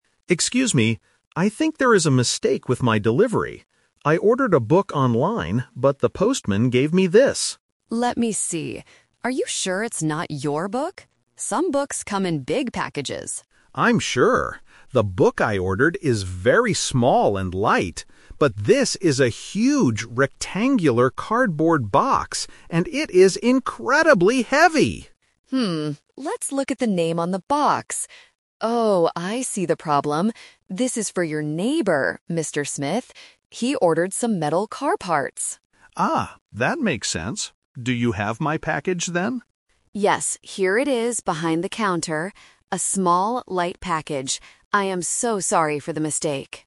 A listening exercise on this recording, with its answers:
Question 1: What did the customer actually order?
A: A small book.

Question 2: How does the customer describe the package he received?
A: It is huge and heavy.

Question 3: Who is the large cardboard box really for?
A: The customer's neighbor.

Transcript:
I think there is a mistake with my delivery. I ordered a book online, but the postman gave me this.
Staff: Let me see. Are you sure it's not your book? Some books come in big packages.
Customer: I'm sure. The book I ordered is very small and light. But this is a huge, rectangular cardboard box. And it is incredibly heavy!
Staff: Hmm, let's look at the name on the box. Oh, I see the problem. This is for your neighbor, Mr. Smith. He ordered some metal car parts.
Customer: Ah, that makes sense. Do you have my package, then?
Staff: Yes, here it is behind the counter. A small, light package. I am so sorry for the mistake!